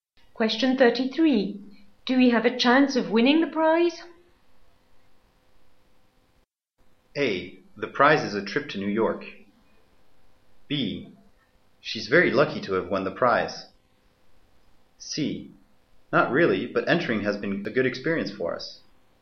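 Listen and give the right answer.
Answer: C: Not really, but entering has been a good experience for us.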